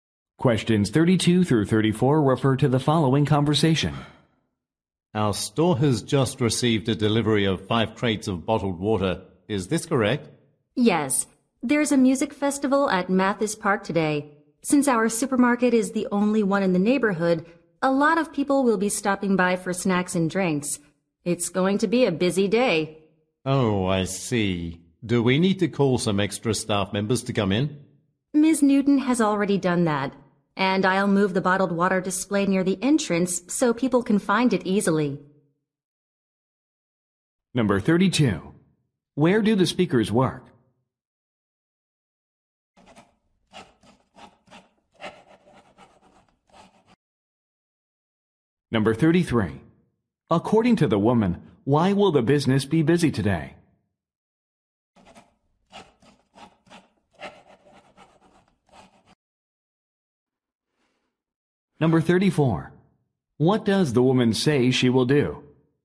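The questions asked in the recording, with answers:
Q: Where do the speakers work?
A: At a supermarket

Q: According to the woman, why will the business be busy today?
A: There is a music festival at Mathis Park

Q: What does the woman say she will do?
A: Move the bottled water display near the entrance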